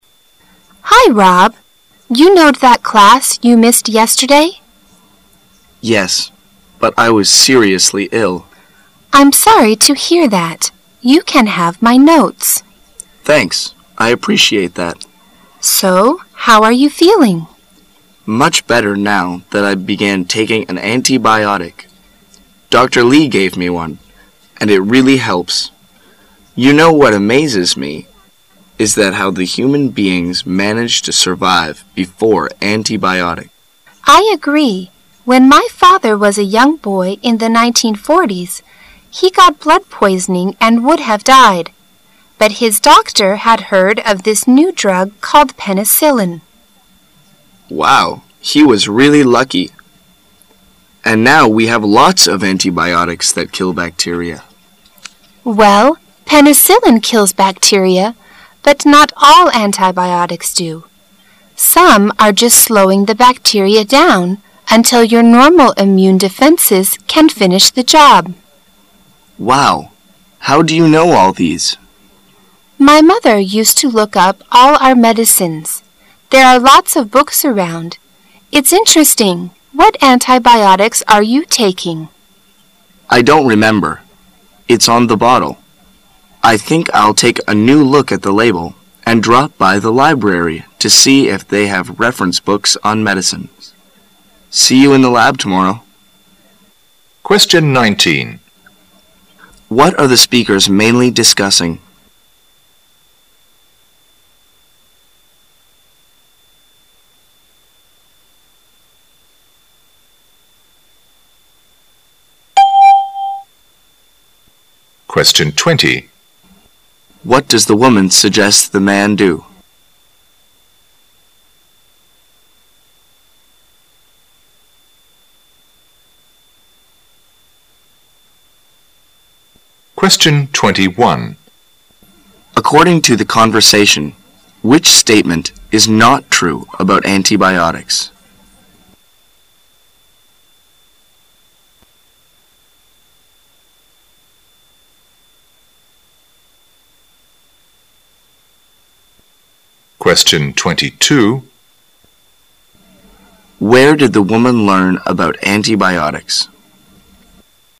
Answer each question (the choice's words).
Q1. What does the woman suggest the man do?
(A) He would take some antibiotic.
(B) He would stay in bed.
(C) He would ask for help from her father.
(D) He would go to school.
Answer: He would take some antibiotic.

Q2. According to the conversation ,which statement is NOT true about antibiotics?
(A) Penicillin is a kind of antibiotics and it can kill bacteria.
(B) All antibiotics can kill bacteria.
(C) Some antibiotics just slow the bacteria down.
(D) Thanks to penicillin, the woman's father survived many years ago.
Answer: All antibiotics can kill bacteria.

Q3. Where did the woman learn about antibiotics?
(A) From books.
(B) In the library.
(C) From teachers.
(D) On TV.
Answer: From books.

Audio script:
[解析] 19-22 W: Hi, Rob, you know that class you missed yesterday? M: Yes, but I was seriously iii. W: I'm sorry to hear that. You (:an have my notes. M: Thanks. I appreciate that. W: So how are you feeling? M: Much better now that I began taking an antibiotic. Doctor Lee gave me one, and it really helps. You know what amazes me is that how the human beings managed to survive before antibiotics. W: I agree. When my father was a young boy in the 1940's, he got blood poisoning and would have died. But his doctor had heard of this new drug called penicillin. M: Wow, he was really lucky. And now we have lots of antibiotics that kill bacteria. W: Well, penicillin kills bacteria, but not all antibiotics do. Some are just slowing the bacteria down until our normal immune defenses can finish the job. M: Wow! How do you know all these? W: My mother used to look up all our medicines. There are lots of books around. It's interesting. What antibiotics are you taking? M: I don't remember. It's on the bottle. I think I'll take a new look at the label and drop by the library to see if they have reference books on medicines. See you in the lab tomorrow. What are the speakers mainly discussing?